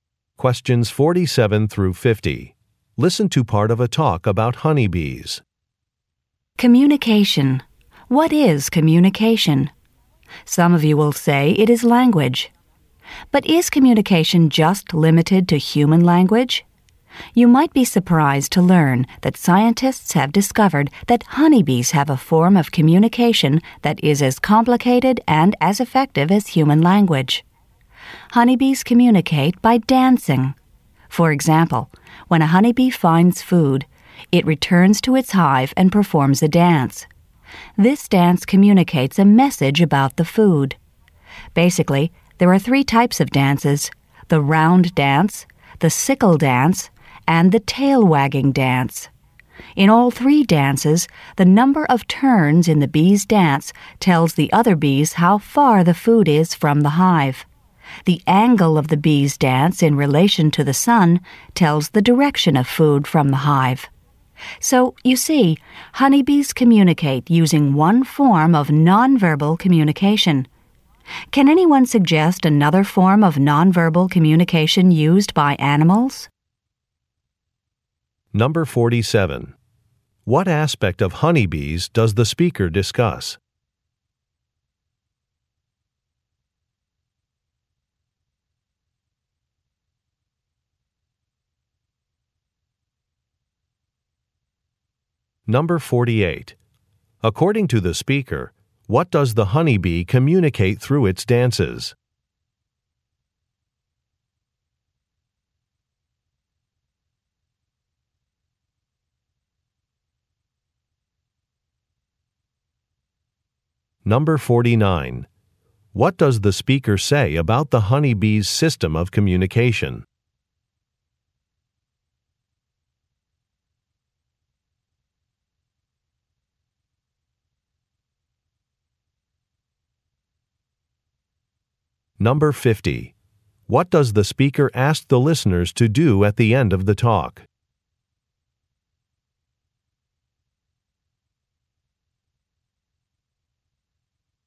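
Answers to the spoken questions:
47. How they communicate
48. The distance and direction of food from the hive
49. It is as complicated and effective as human language
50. Suggest another form of nonverbal communication used by animals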